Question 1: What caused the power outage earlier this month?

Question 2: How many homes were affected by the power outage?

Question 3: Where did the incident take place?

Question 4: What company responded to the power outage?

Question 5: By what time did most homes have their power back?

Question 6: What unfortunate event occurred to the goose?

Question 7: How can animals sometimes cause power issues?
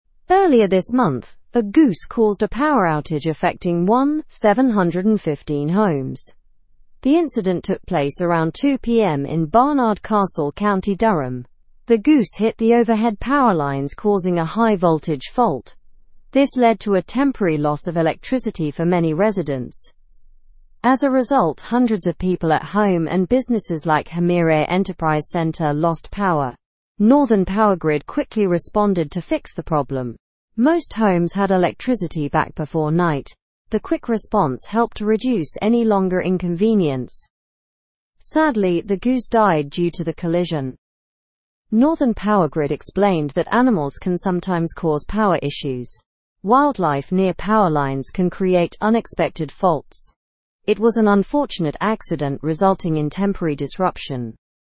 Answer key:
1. A goose hitting the power lines caused the power outage.
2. 1,715 homes were affected.
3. The incident took place in Barnard Castle, County Durham.
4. Northern Powergrid responded to the power outage.
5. Most homes had electricity back before night.
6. The goose died due to the collision.
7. Animals can cause power issues by hitting power lines.

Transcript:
Earlier this month, a goose caused a power outage affecting 1,715 homes. The incident took place around 2 PM in Barnard Castle, County Durham. The goose hit the overhead power lines causing a high-voltage fault. This led to a temporary loss of electricity for many residents.
As a result, hundreds of people at home and businesses like Hamire Enterprise Centre lost power. Northern Powergrid quickly responded to fix the problem. Most homes had electricity back before night. The quick response helped to reduce any longer inconvenience.
Sadly, the goose died due to the collision. Northern Powergrid explained that animals can sometimes cause power issues. Wildlife near power lines can create unexpected faults. It was an unfortunate accident resulting in temporary disruption.

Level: (Level 2)